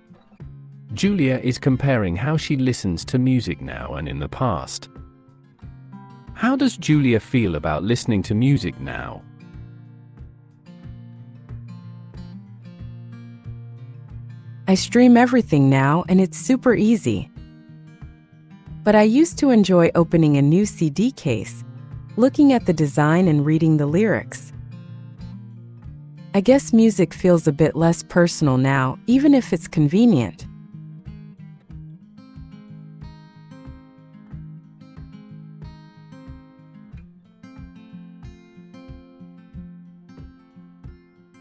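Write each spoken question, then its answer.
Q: How does Julia feel about listening to music now?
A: it's convenient but feels less personal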